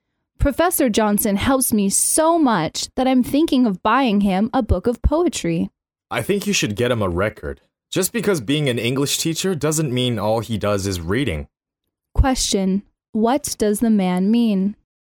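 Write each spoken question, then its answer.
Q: What does the man mean?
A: She should buy the professor a record instead of a poetry book.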